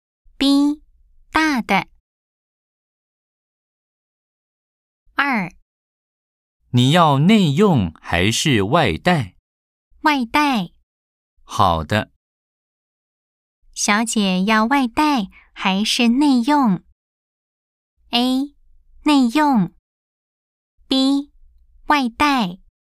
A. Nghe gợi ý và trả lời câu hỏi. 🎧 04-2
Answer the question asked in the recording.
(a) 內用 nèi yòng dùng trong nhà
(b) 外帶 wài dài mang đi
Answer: (b) 外帶 wài dài mang đi